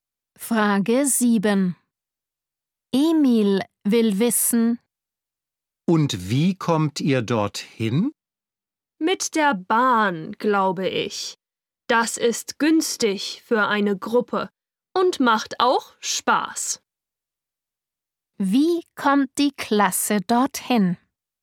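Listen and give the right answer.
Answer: Mit der Bahn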